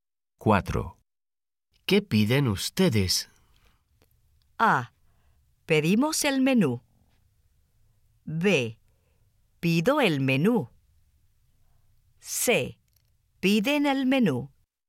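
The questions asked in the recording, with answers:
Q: ¿Qué piden ustedes?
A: A: Pedimos el menú.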